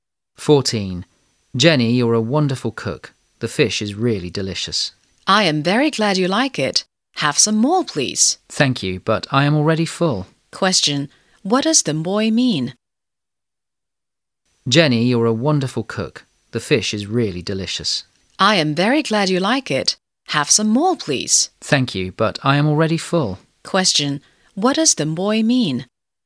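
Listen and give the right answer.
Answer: He is full and doesn't want any more fish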